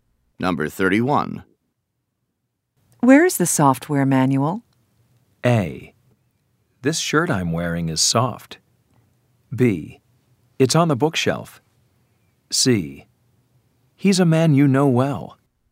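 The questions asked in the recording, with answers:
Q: Where is the software manual?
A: B: It's on the bookshelf.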